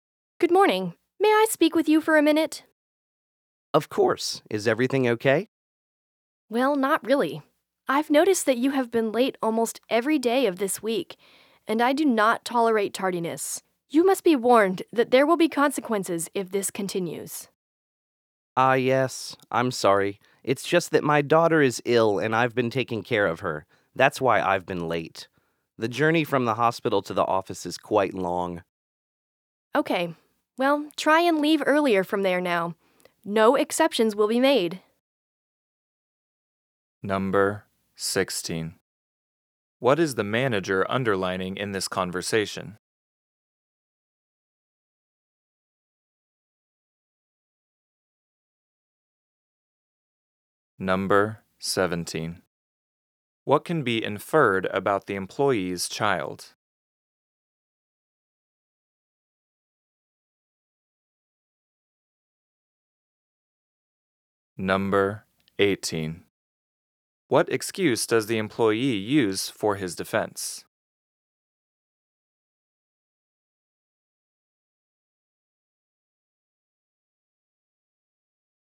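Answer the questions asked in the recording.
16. That lateness will not be tolerated and there will be consequences if it continues
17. She is ill and in the hospital
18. His daughter is ill and he has been caring for her; the journey from the hospital is long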